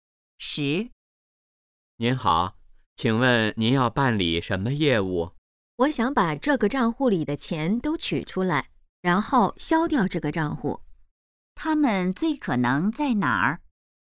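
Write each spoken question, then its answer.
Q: 他们最可能在哪儿?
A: 银行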